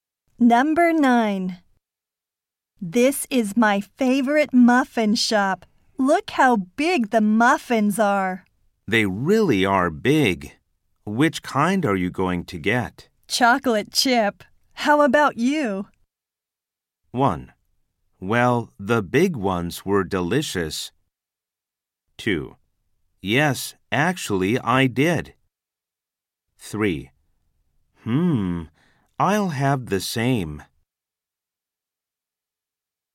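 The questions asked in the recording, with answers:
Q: Chocolate chip. How about you?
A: 3: I'll have the same.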